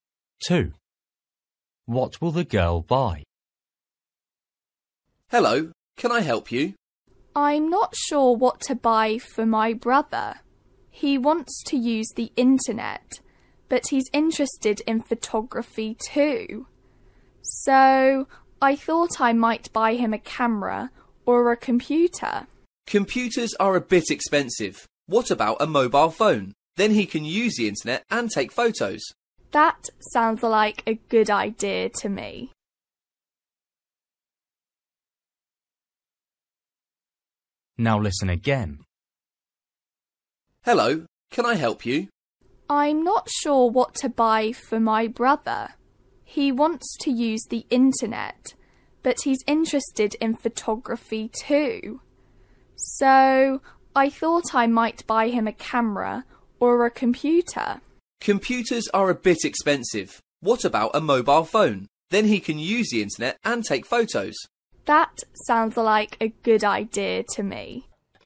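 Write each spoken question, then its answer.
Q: What will the girl buy?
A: A mobile phone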